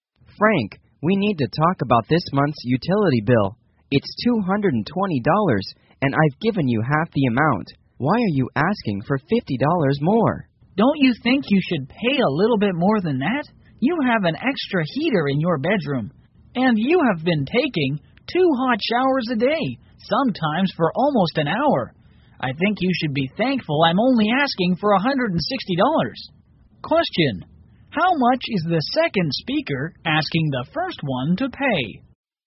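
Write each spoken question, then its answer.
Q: How much is the second speaker asking the first one to pay?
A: $160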